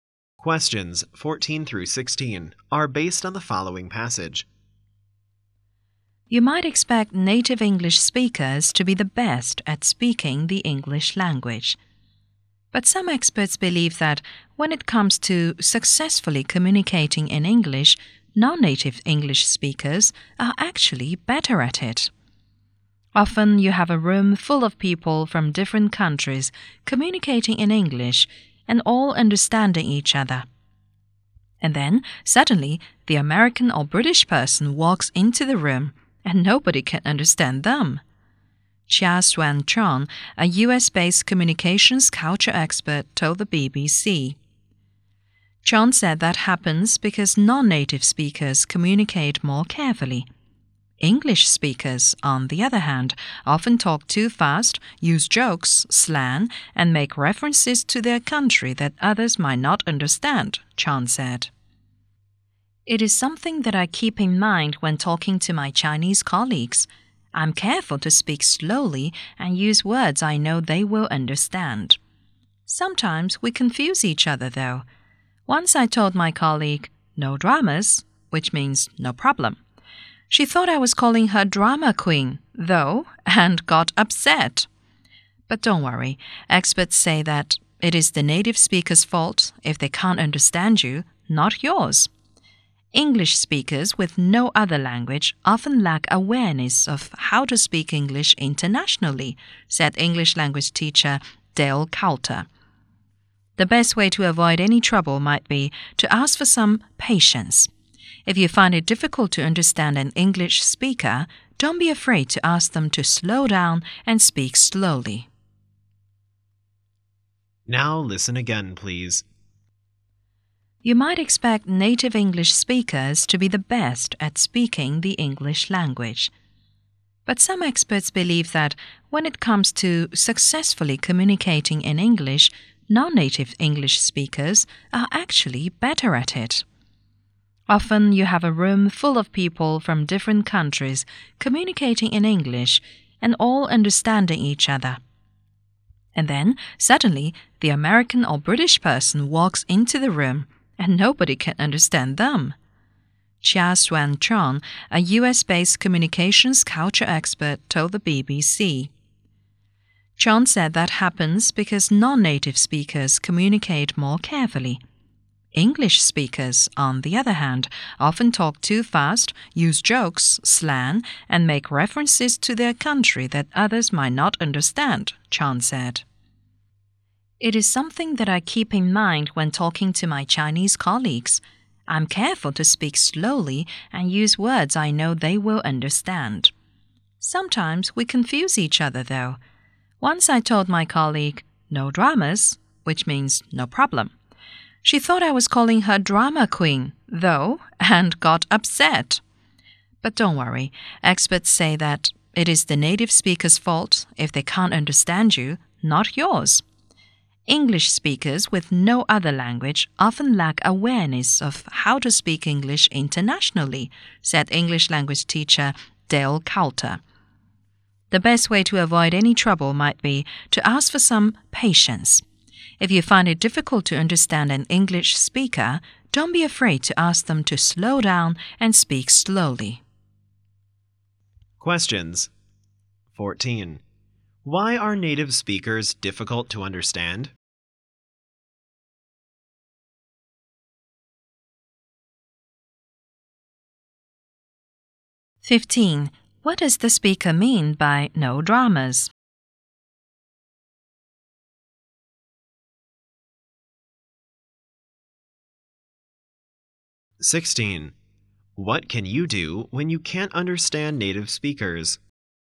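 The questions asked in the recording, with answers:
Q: Why are native speakers difficult to understand?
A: They talk too fast and use jokes, slang and local references.

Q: What does the speaker mean by no dramas?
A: No problem.

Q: What can you do when you can't understand native speakers?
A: Ask them to slow down and speak slowly.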